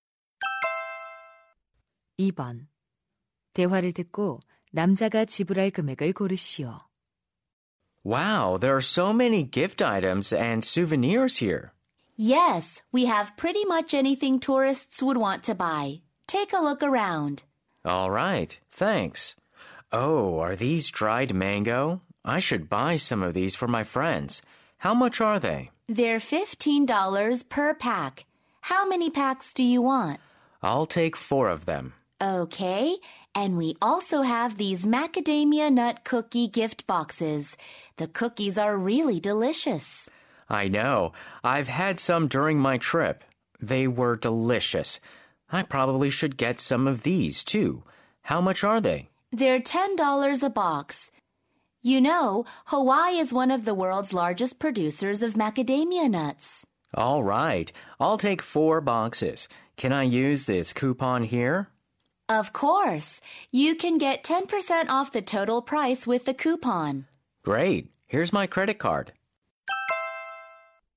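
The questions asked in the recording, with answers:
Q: 대화를 듣고 남자가 지불할 금액을 고르시오.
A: $90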